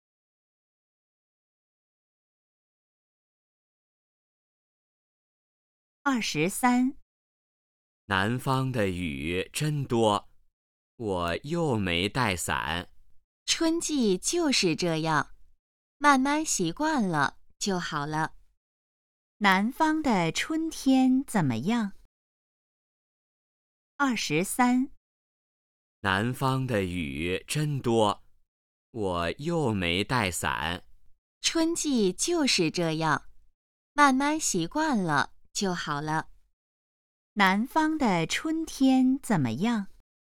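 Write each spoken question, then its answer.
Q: 南方的春天怎么样?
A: 雨很多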